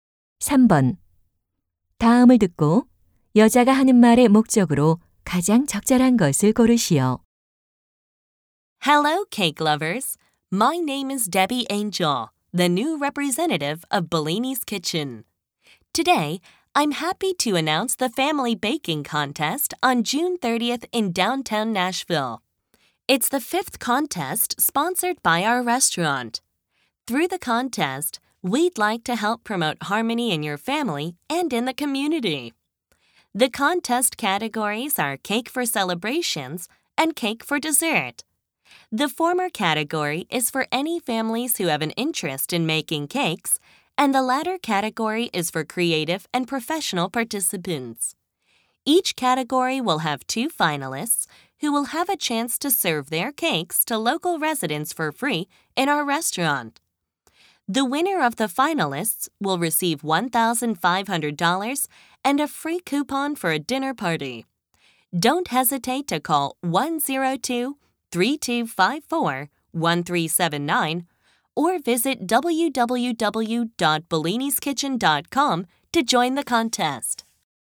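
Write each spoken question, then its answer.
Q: 다음을 듣고 여자가 하는 말의 목적으로 가장 적절한 것을 고르시오.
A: 가족 케이크 굽기 대회를 알리려고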